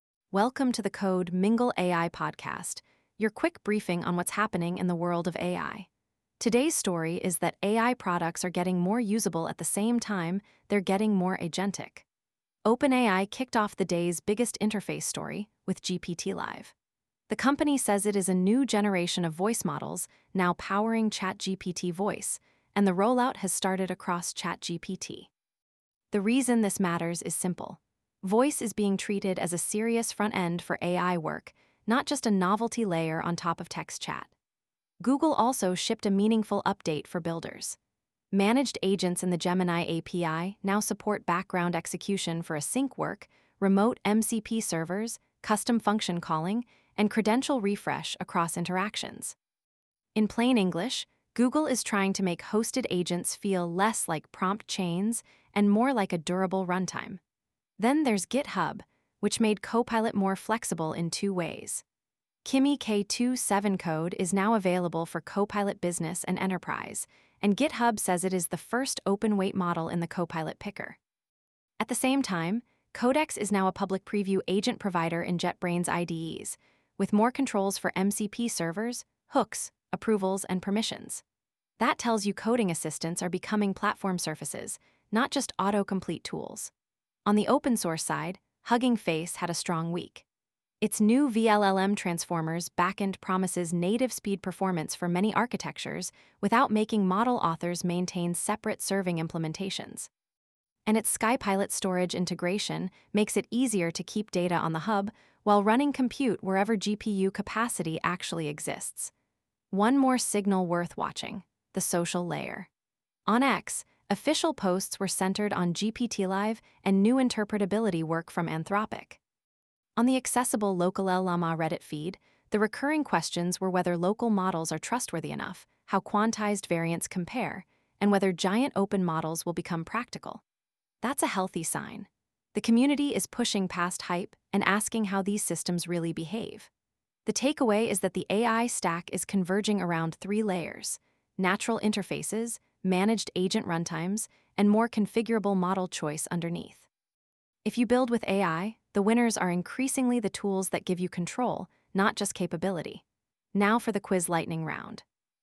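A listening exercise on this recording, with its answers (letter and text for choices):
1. What is the most important practical signal from OpenAI's GPT-Live launch?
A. Voice is being treated as a first-class interface for AI assistants, not just a text-to-speech add-on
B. OpenAI is shutting down text chat in favor of audio only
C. The API is already mandatory for all ChatGPT users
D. Voice models no longer need any reasoning backends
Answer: A. Voice is being treated as a first-class interface for AI assistants, not just a text-to-speech add-on

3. Why is GitHub's Kimi K2.7 Code announcement notable for enterprise developers?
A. It is the first mobile-only model in Copilot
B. It replaces all proprietary models in Copilot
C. It is the first open-weight model selectable in the Copilot model picker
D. It removes the need for admin approval policies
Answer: C. It is the first open-weight model selectable in the Copilot model picker

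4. What is the main infrastructure benefit of Hugging Face's zero-egress storage integration with SkyPilot?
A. It forces all training jobs onto one cloud provider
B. It lets teams move compute to available GPUs without paying Hub data egress fees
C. It eliminates the need for object storage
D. It guarantees every workload runs faster than on-prem clusters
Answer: B. It lets teams move compute to available GPUs without paying Hub data egress fees

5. What did the accessible X and Reddit scan suggest about the current AI community mood?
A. People only care about a single benchmark leaderboard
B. The main interest is in NFT integrations for chatbots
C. Attention is clustering around voice UX, agent controls, model trust, and open-model experimentation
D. Community discussion has largely moved away from local models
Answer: C. Attention is clustering around voice UX, agent controls, model trust, and open-model experimentation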